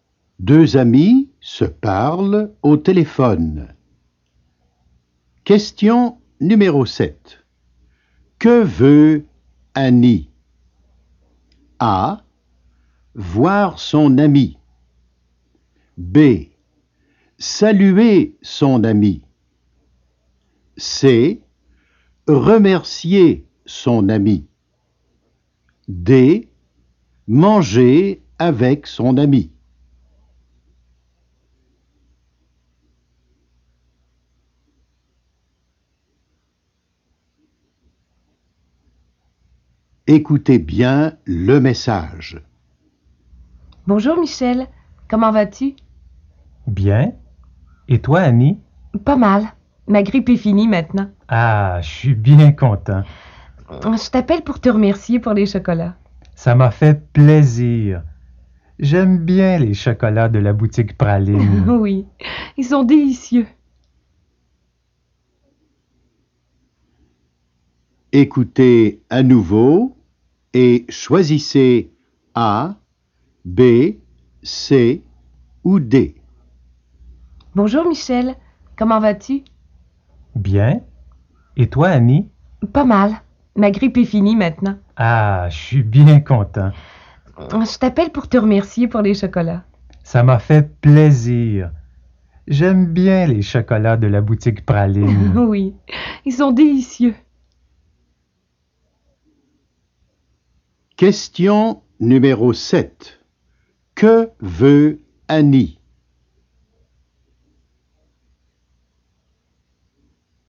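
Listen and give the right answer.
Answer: C: Remercier son ami.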